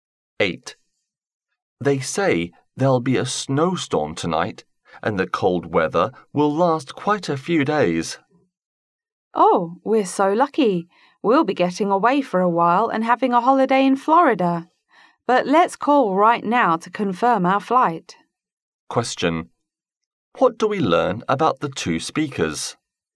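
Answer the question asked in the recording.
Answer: They are going on holiday to Florida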